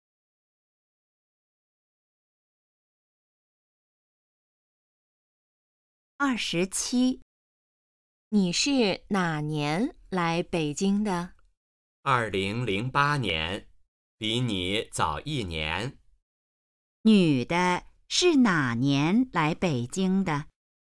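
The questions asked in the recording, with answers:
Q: 女的是哪年来北京的?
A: 2008年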